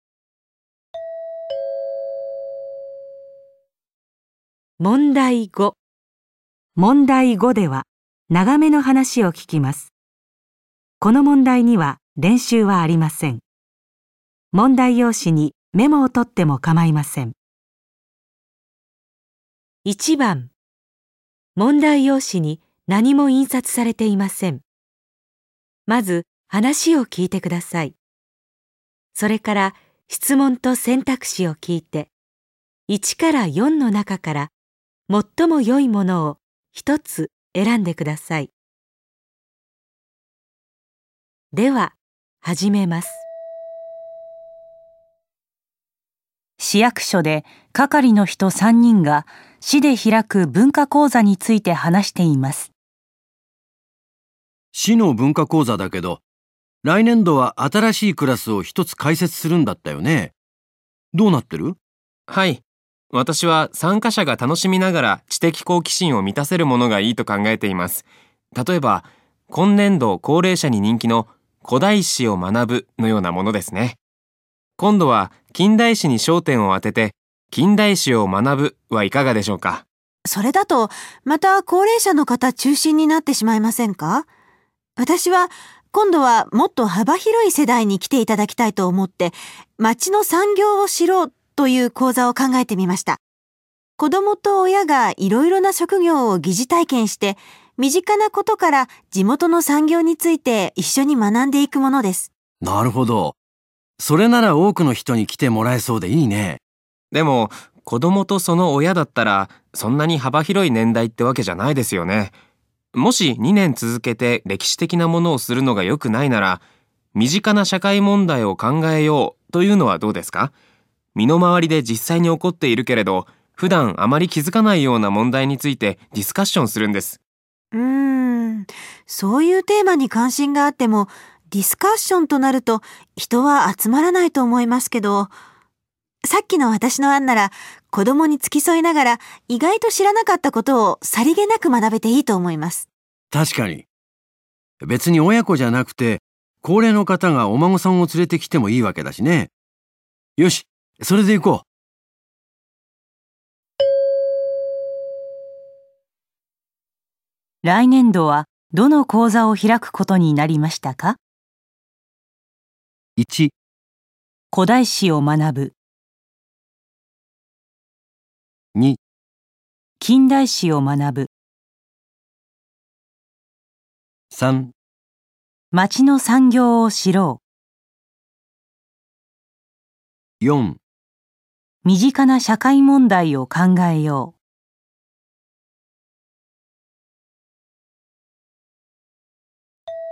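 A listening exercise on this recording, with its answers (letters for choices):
問題用紙に何も印刷されていません。まず話を聞いてください。それから、質問とせんたくしを 聞いて、1から4の中から、最もよいものを一つ選んでください。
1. 来年度はどの講座を開くことになりましたか。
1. 古代史を学ぶ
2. 近代史を学ぶ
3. 町の産業を知ろう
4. 身近な社会問題を考えよう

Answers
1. 3

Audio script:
男2:はい。 私は参加者が楽しみながら知的好奇心を満たせるものがいいと考えています。 例えば、 今年度高 齢者に人気の「古代史を学ぶ」 のようなものですね。 今度は近代史に焦点を当てて、「近代史を学ぶ」はいか がでしょうか?
女 : それだと、 また高齢者の方中心になってしまいませんか?私は、今度はもっと幅広い世代に来ていただきた
いと思って「町の産業を知ろう」 という講座を考えてみました。 子供と親がいろいろな職業を疑似体験して身 近なことから地元の産業について一緒に学んでいくものです。
男 1:なるほど、 それなら多くの人に来てもらえそうでいいね。
男2:でも、子供とその親だったら、 それほど幅広い年代ってわけじゃないですよね? もし2年続けて歴史的な ものをするのがよくないなら、「身近な社会問題を考えよう」というのはどうですか? 身の回りで実際に起こっ ているけれど、普段あまり気づかないような問題についてディスカッションするんです。
女:うーん、そういうテーマに関心があっても、ディスカッションとなると人は集まらないと思いますけど・・・。 さっ きの私の案なら子供に付き添いながら意外と知らなかったことをさりげなく学べていいと思います。
男1:確かに。別に親子じゃなくて、 高齢の方がお孫さんも連れてきてもいいわけだしね。よし、それでいこう。

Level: N1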